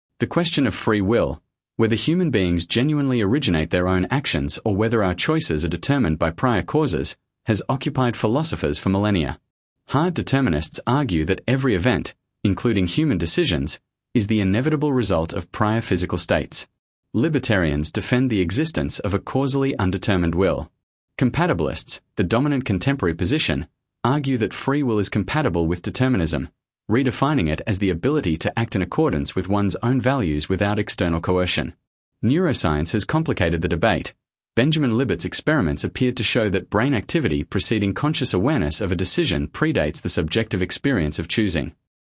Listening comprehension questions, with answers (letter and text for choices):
Select the paragraph that best summarises the recording.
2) Sample Text 2 — The Philosophy of Free Will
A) A. Neuroscientific evidence has conclusively proven that human beings do not possess free will.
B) B. The debate between determinism and compatibilism about free will has been intensified but not resolved by neuroscientific findings about unconscious brain activity.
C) C. The question of free will is entirely a theological rather than a philosophical or scientific concern.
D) D. Compatibilists and determinists agree that free will is logically impossible in a causally determined universe.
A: B) B. The debate between determinism and compatibilism about free will has been intensified but not resolved by neuroscientific findings about unconscious brain activity.